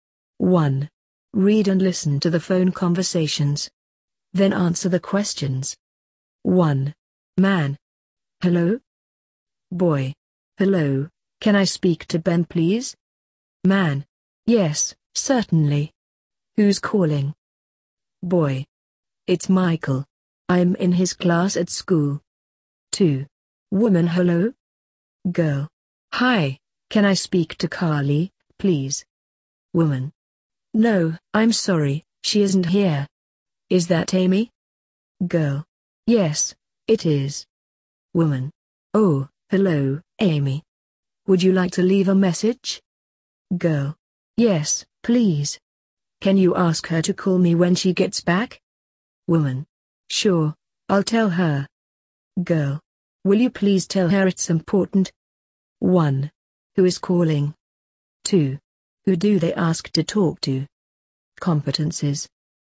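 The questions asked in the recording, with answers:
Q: Who is calling?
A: Michael (1) and Amy (2)

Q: Who do they ask to talk to?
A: Ben (1) and Carly (2)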